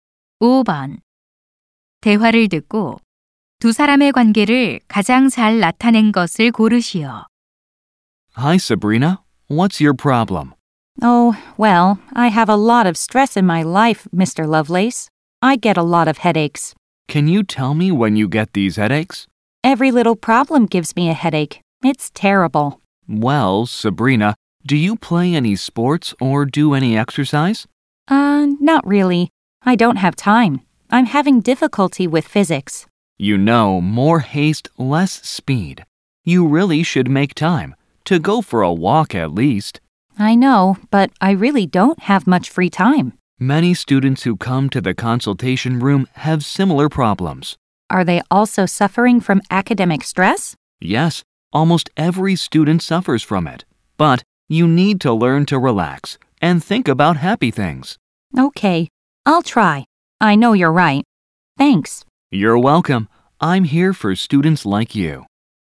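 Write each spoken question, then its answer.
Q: 대화를 듣고 두 사람의 관계를 가장 잘 나타낸 것을 고르시오.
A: 상담 교사 - 학생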